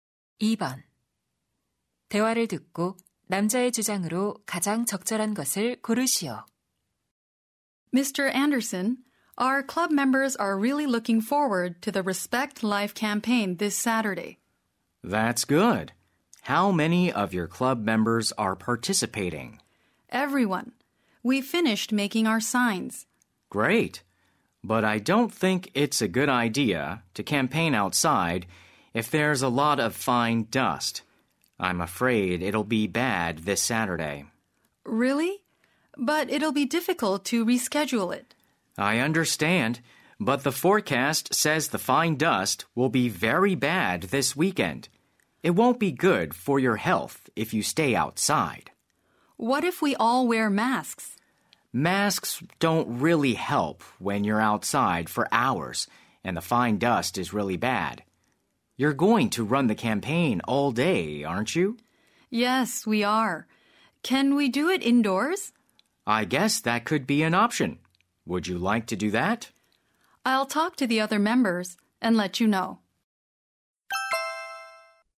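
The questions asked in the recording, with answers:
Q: 대화를 듣고 남자의 주장으로 가장 적절한 것을 고르시오.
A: 미세먼지가 심할 때는 야외 캠페인을 하지 말아야 한다.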